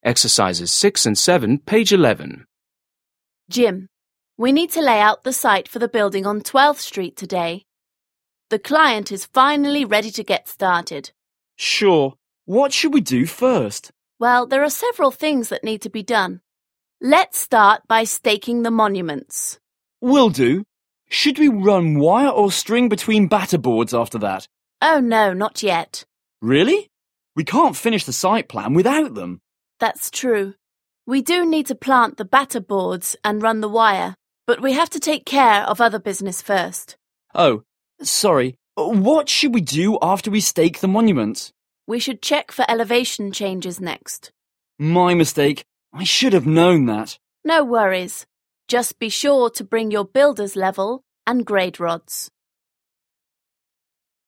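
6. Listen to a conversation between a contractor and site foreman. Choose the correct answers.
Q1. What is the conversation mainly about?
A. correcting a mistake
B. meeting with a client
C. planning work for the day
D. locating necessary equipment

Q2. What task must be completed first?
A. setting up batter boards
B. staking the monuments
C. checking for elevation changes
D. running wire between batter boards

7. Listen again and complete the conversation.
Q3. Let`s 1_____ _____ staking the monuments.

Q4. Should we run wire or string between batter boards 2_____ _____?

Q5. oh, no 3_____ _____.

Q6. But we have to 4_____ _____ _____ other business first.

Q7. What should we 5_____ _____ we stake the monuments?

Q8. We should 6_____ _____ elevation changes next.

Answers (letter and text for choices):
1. C. planning work for the day
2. B. staking the monuments
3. start by
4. after that
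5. not yet
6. take care of
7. do after
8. check for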